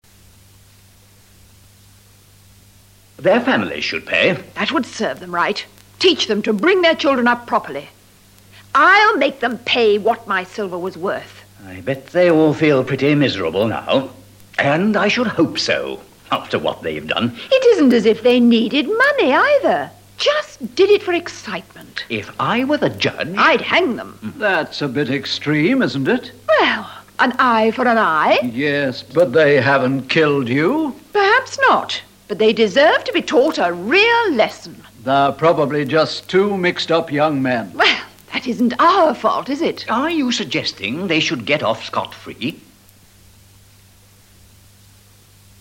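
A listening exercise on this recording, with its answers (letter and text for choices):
WHILE LISTENING TO THE DIALOGUE AGAIN TRY TO COMPLETE THIS MULTIPLE CHOICE ACTIVITY.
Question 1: Why did they steal from Barbara and Harry?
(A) They stole just for excitement.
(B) They were poor and their families needed money.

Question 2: What does Barbara feel about the thieves?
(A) She wants to make the police pay for the silver.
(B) She is very angry, and wishes she could kill them.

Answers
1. (A) They stole just for excitement.
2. (B) She is very angry, and wishes she could kill them.

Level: ADVANCED LEVEL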